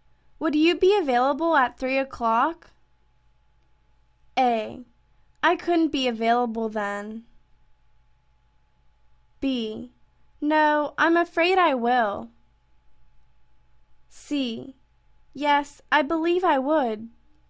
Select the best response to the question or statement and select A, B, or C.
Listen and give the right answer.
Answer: Yes, I believe I would.